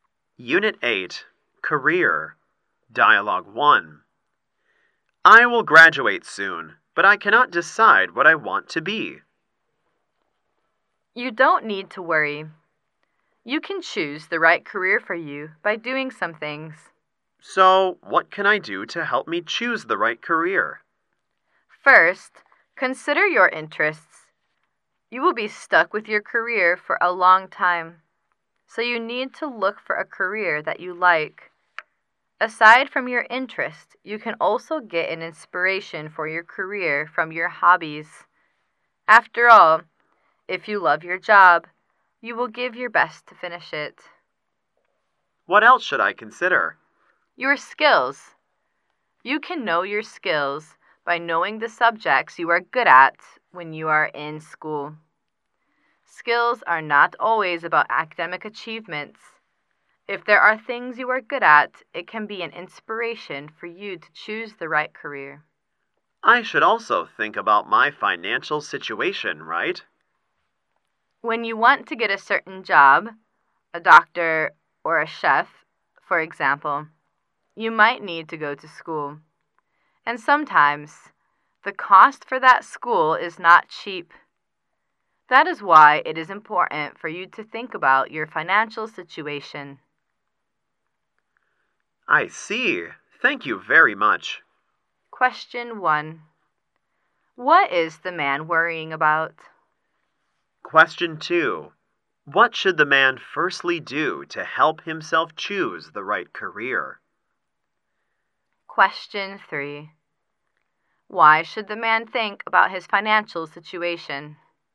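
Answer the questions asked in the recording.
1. He cannot decide what career he wants after graduating
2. Consider his interests
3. Some careers need schooling that can be expensive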